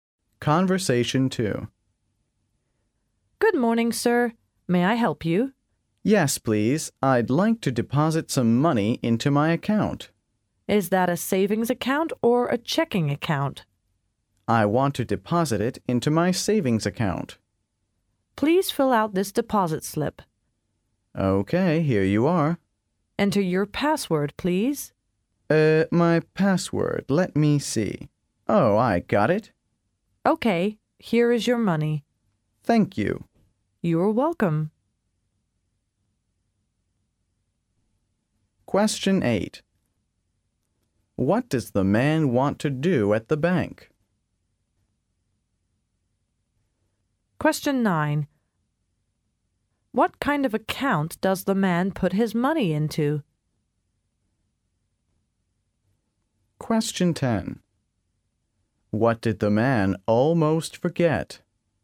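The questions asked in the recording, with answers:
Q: What does the man want to do at the bank?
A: Deposit some money into his account

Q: What kind of account does the man put his money into?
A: A savings account

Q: What did the man almost forget?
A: His password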